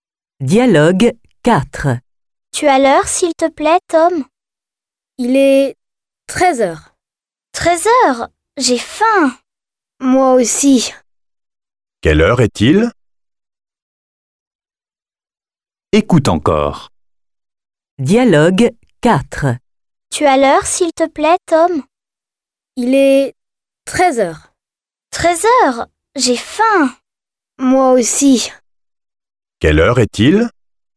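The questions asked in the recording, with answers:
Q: Quelle heure est-il ?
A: 13 heures.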